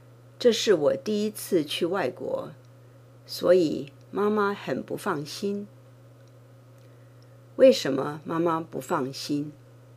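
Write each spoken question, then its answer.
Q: 为什么妈妈不放心?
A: 因为这是我第一次去外国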